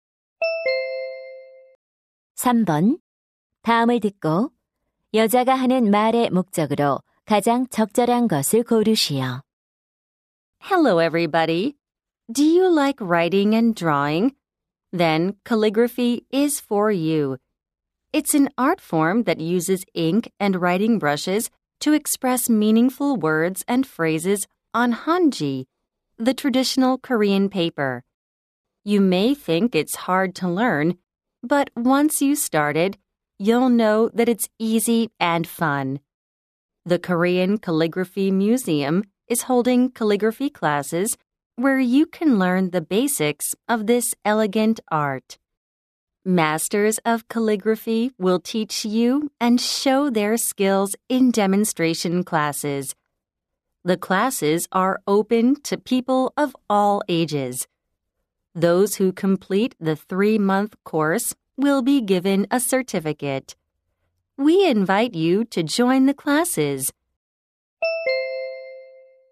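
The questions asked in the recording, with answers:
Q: 다음을 듣고 여자가 하는 말의 목적으로 가장 적절한 것을 고르시오.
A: 서예 강좌 참여를 권유하려고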